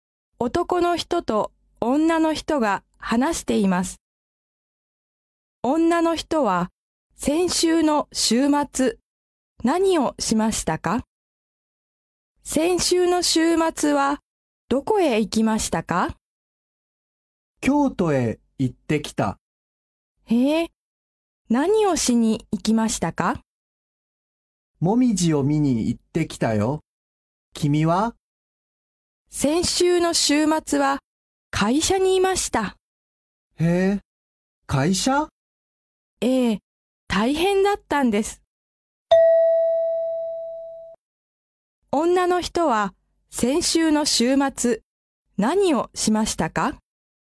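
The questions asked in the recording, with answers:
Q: 先週の週末、何をしましたか?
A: 会社にいた(仕事をした)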